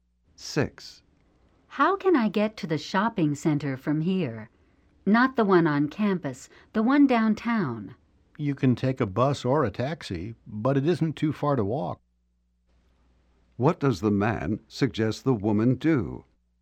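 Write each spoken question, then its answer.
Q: What does the man suggest the woman do?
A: Walk to the shopping center downtown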